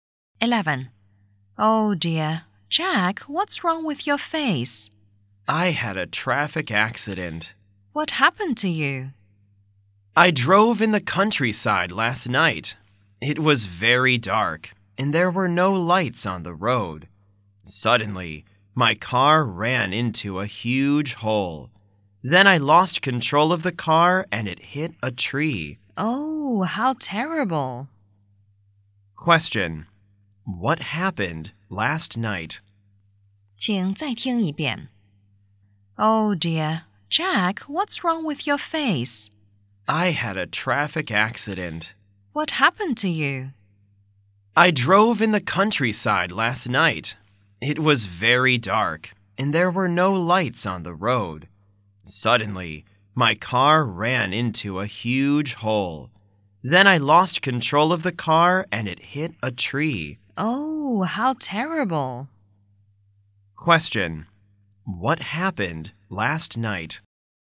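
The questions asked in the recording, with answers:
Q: What happened last night?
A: Jack had a traffic accident; his car hit a tree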